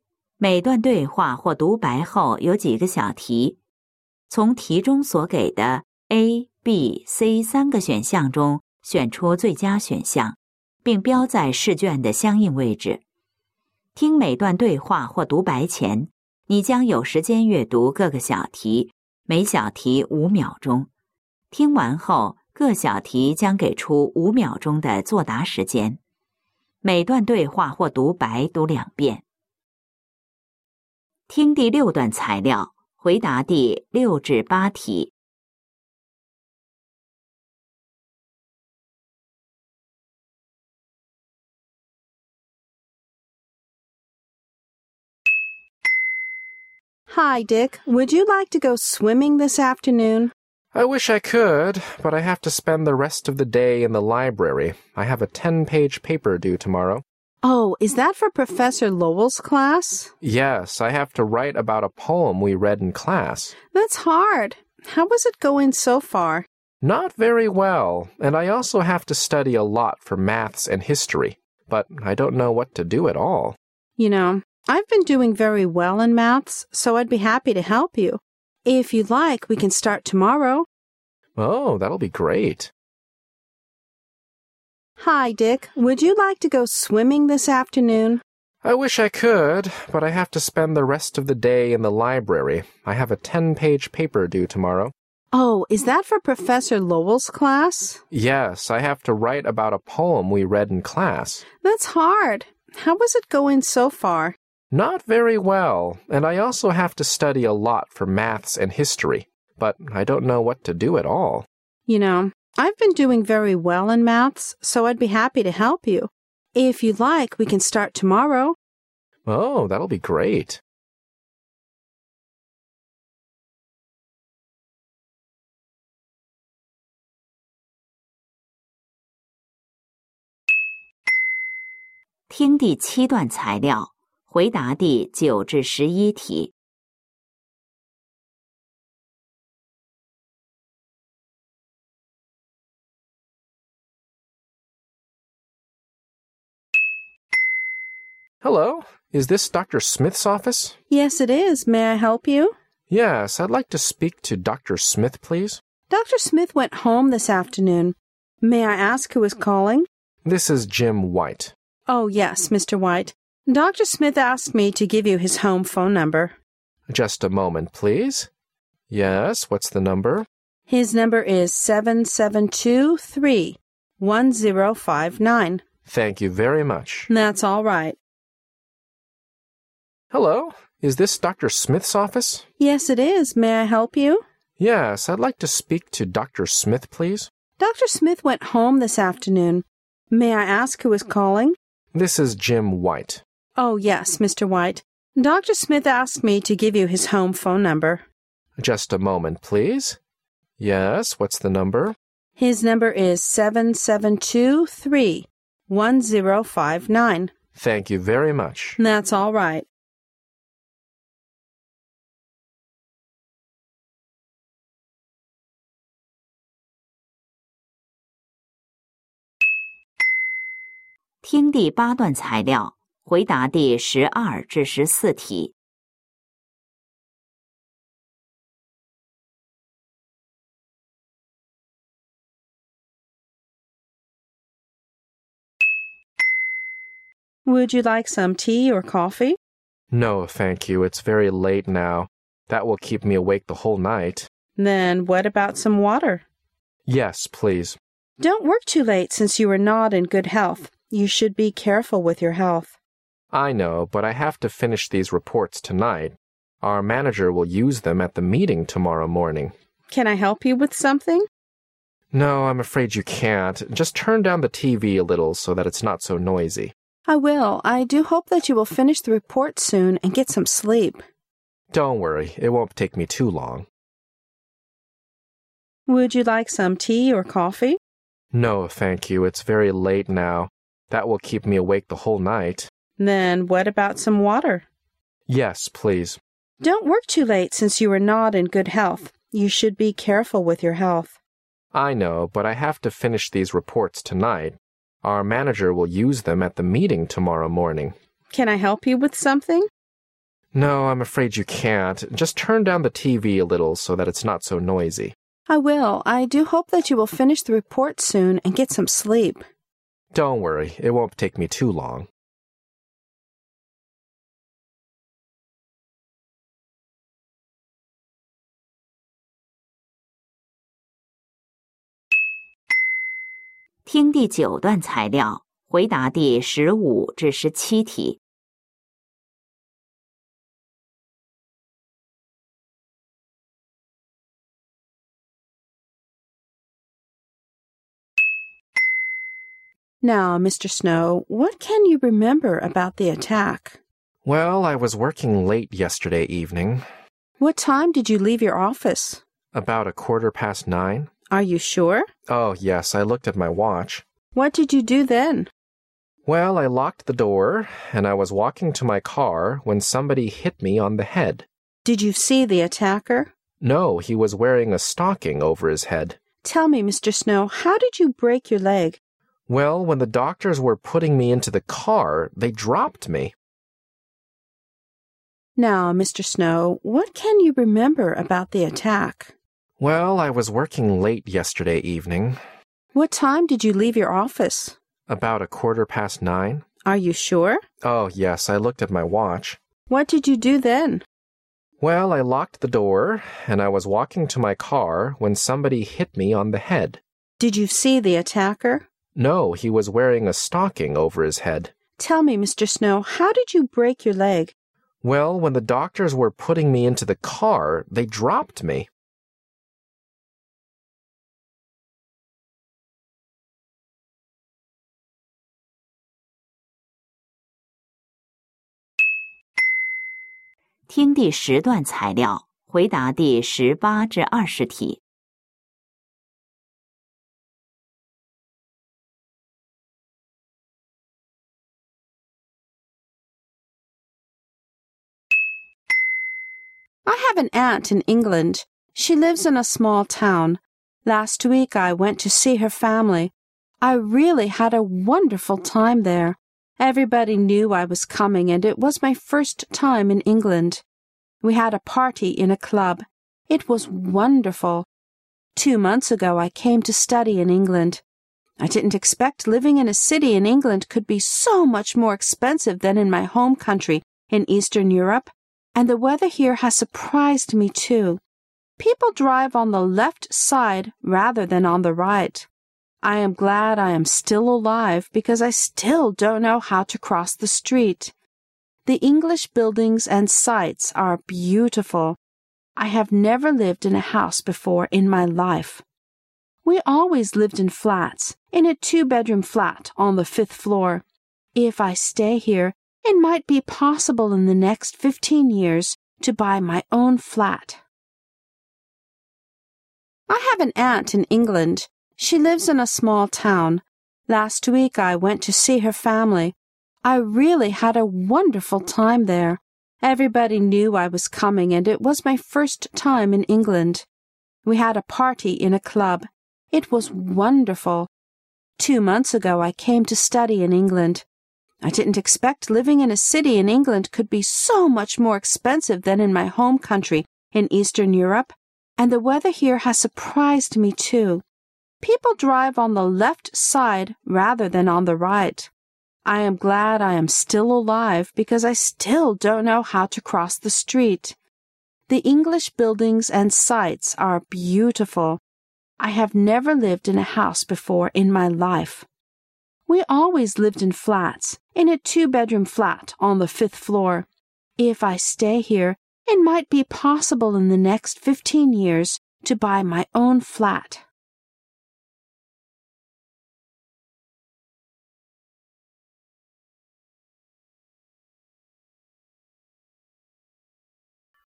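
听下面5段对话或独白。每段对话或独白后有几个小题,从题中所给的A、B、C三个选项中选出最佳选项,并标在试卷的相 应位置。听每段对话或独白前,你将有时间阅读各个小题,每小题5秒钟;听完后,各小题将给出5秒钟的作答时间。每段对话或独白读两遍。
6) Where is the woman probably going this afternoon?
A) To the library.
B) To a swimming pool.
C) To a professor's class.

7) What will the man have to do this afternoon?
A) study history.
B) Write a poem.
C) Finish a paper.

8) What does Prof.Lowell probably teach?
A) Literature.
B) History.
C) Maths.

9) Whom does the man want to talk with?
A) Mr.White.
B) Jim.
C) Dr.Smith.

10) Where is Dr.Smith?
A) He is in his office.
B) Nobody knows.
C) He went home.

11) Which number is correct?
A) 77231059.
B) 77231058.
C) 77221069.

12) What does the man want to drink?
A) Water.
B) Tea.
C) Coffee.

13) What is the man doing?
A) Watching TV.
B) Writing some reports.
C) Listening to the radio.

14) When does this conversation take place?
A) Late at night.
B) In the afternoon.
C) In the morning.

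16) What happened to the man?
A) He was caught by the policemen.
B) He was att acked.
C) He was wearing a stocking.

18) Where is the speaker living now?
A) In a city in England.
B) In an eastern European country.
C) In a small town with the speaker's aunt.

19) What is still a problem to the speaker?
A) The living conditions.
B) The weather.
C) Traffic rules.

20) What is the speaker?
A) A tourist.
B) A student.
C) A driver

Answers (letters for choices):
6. B
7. C
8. A
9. C
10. C
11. A
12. A
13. B
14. A
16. B
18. A
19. C
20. B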